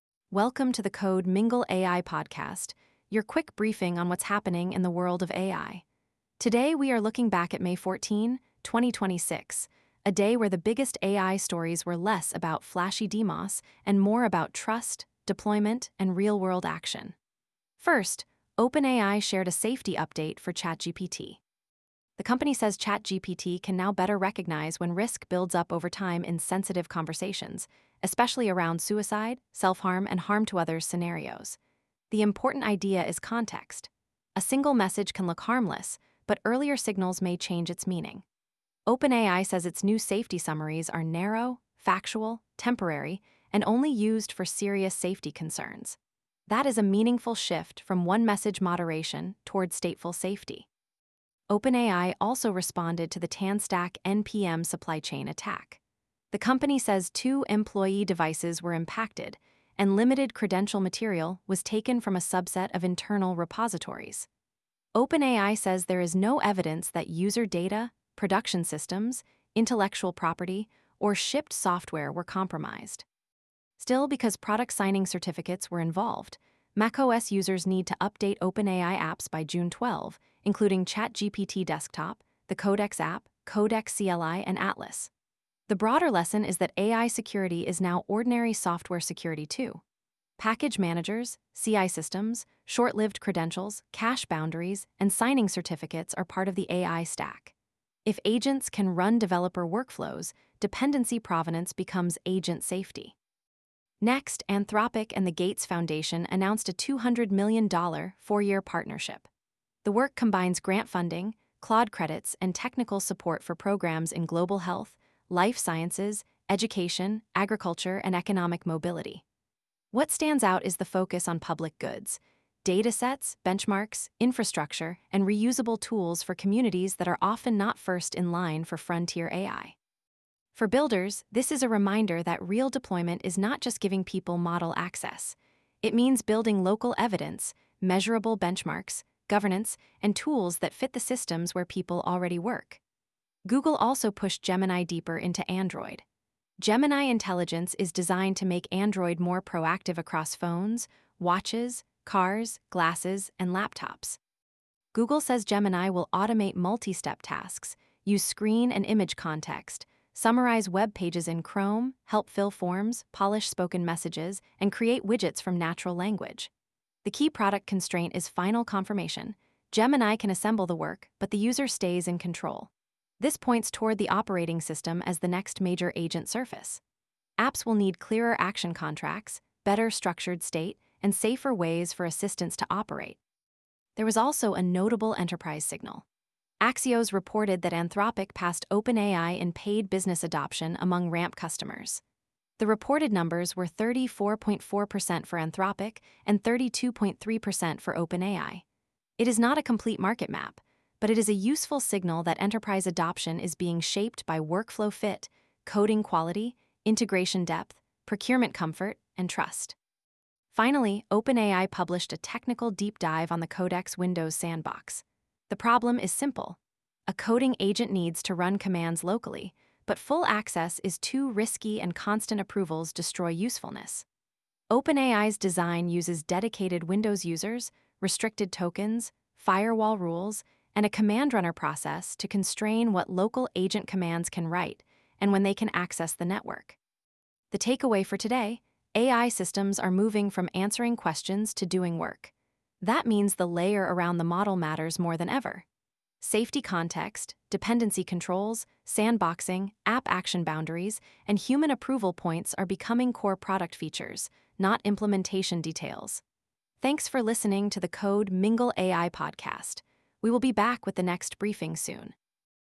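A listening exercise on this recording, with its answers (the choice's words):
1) What is the main purpose of OpenAI's new safety summaries in ChatGPT?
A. To create general long-term personalization for all chats.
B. To help ChatGPT use narrowly scoped safety-relevant context when serious risk emerges over time.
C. To let users publish sensitive conversations automatically.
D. To replace all crisis resources with model-generated advice.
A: To help ChatGPT use narrowly scoped safety-relevant context when serious risk emerges over time.

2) What user action did OpenAI recommend after the TanStack supply-chain incident?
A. All users should change their OpenAI passwords immediately.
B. macOS users should update OpenAI apps signed with new certificates by June 12, 2026.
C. Windows users should uninstall all OpenAI applications permanently.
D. Developers should stop using npm entirely.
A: macOS users should update OpenAI apps signed with new certificates by June 12, 2026.

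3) What is Anthropic's partnership with the Gates Foundation focused on?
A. Consumer entertainment apps for Claude users.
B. Public-interest AI across health, education, agriculture, life sciences, and economic mobility.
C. Replacing all public health workers with autonomous agents.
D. A private-only model benchmark that will not be shared.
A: Public-interest AI across health, education, agriculture, life sciences, and economic mobility.

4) What does Google's Gemini Intelligence announcement show about consumer AI agents?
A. They are moving into operating-system-level workflows across apps and devices.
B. They can only answer static search queries.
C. They require users to give up final confirmation for purchases.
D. They are limited to desktop browsers.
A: They are moving into operating-system-level workflows across apps and devices.

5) Why is OpenAI's Codex Windows sandbox technically important?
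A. It shows that coding agents can be made safe purely through prompts.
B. It removes the need for any operating-system permissions.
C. It uses OS-level controls such as restricted tokens, dedicated users, and firewall rules to constrain local agent commands.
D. It prevents Codex from reading or writing any local files.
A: It uses OS-level controls such as restricted tokens, dedicated users, and firewall rules to constrain local agent commands.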